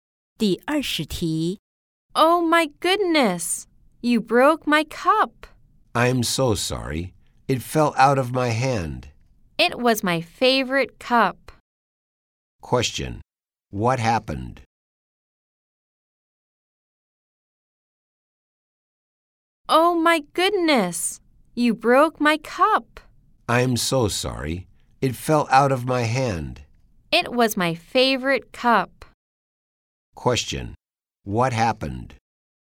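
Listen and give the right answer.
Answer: Someone broke a cup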